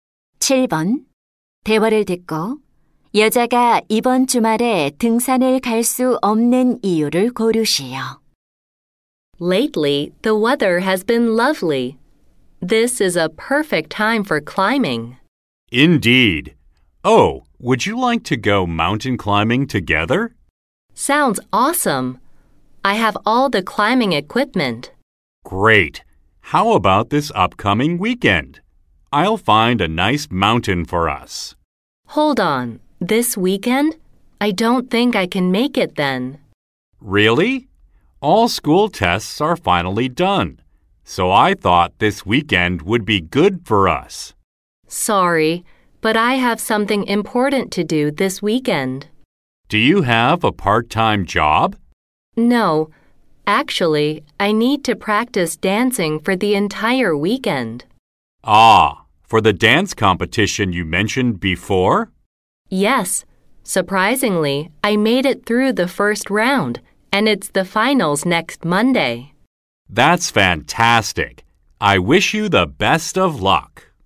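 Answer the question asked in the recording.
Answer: 댄스 대회 결승을 위해 춤 연습을 해야 해서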